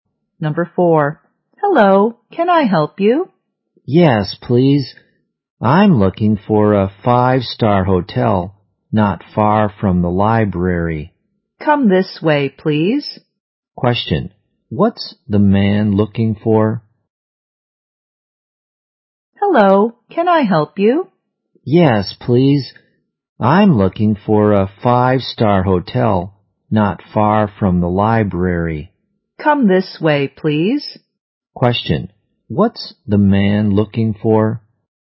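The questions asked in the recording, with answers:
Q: what's the man looking for?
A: A 5-star hotel not far from the library.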